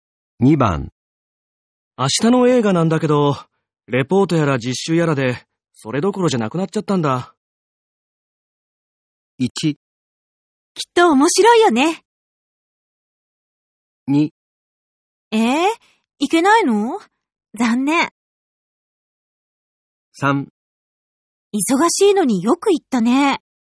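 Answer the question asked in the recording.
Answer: 2: いけないの?残念。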